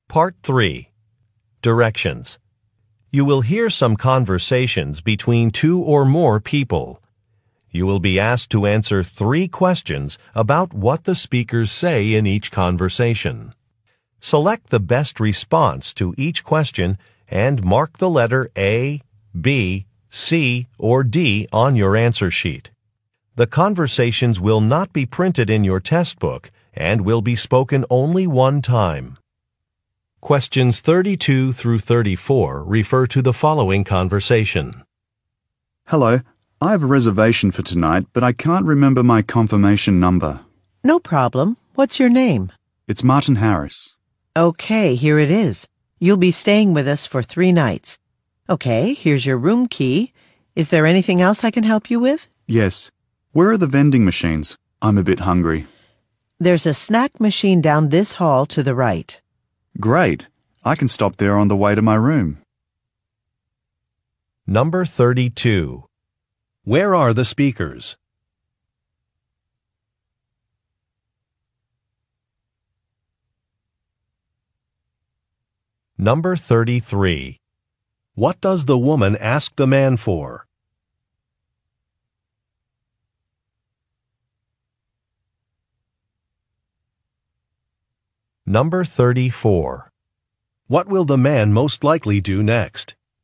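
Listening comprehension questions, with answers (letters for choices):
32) Where are the speakers?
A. At an airport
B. At a restaurant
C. At a theater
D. At a hotel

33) What does the woman ask the man for?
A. His reservation number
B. His name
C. His departure day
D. His credit card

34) What will the man most likely do next?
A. Park his car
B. Upgrade a reservation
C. Buy a snack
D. Go to the pool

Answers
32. D
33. B
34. C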